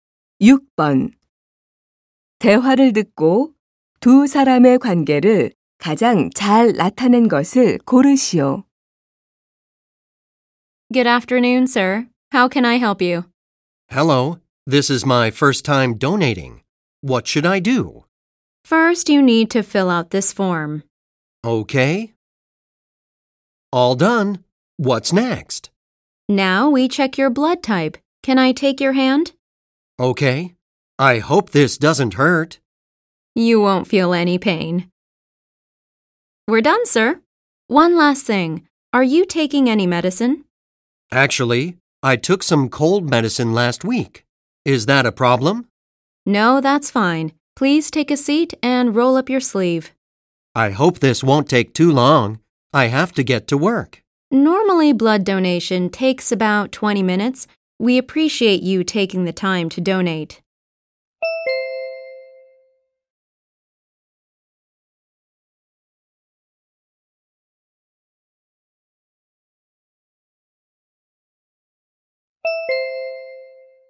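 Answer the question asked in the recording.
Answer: 헌혈자 - 헌혈 담당 간호사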